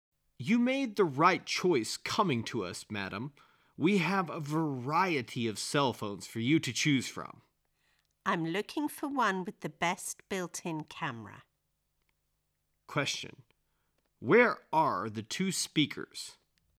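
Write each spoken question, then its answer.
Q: Where are the two speakers?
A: In a cell phone store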